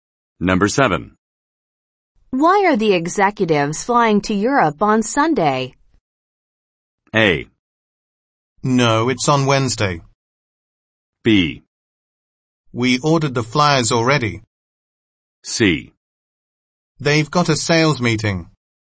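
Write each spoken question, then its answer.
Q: Why are the executives flying to Europe on Sunday?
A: C: They've got a sales meeting.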